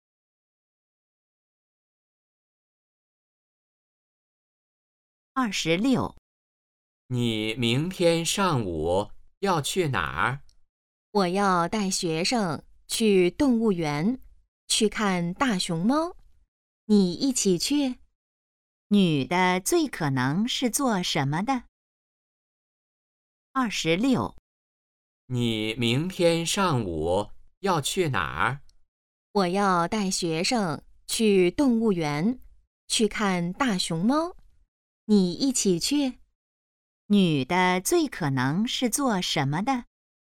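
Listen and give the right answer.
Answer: 老师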